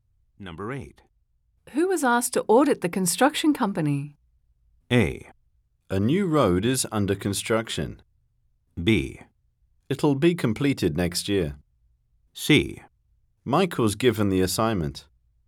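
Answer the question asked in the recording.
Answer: C: Mike was given the assignment.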